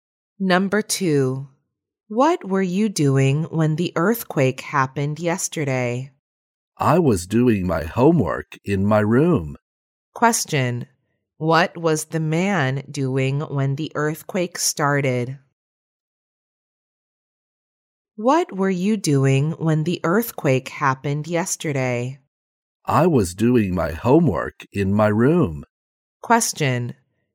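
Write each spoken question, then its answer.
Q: What was the man doing when the earthquake started?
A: Doing his homework in his room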